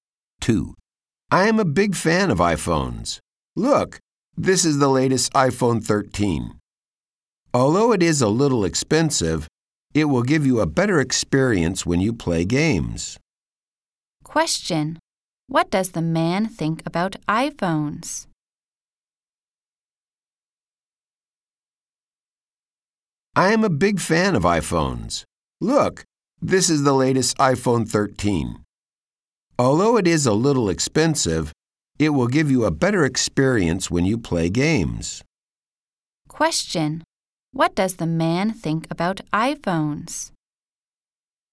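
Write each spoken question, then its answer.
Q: Question. What does the man think about iPhones?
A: He is a big fan; they are a little expensive but give a better experience for games.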